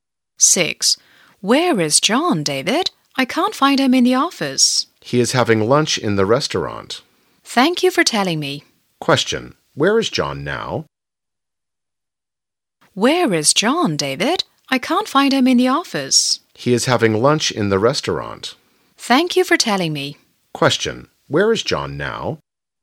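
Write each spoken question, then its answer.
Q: Question. Where is John now?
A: In the restaurant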